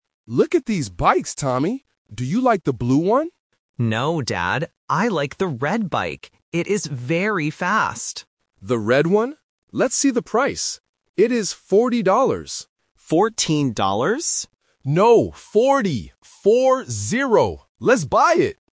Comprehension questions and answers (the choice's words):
Listen to the conversation and choose the correct answer (A, B, or C).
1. Which bike does Tommy like?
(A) The blue bike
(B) The red bike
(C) The black bike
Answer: The red bike

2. Why does Tommy like the bike?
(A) It is very fast.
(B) It is very big.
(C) It is very cheap.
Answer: It is very fast.

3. How much is the bike?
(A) $14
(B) $40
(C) $44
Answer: $40

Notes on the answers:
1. Tommy says clearly, "I like the red bike." Option (A) is a trap because the Dad asks about the blue one first, but Tommy says "No". Option (C) is not mentioned.
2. Right after choosing the red bike, Tommy explains his reason: "It is very fast!". Options (B) and (C) are just plausible reasons to buy a bike but are not in the audio.
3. The Dad says the price is "forty dollars" and repeats it as "four - zero" to be clear. Option (A) is a trap because Tommy mishears it as "Fourteen" (14), but the Dad immediately corrects him.

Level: A1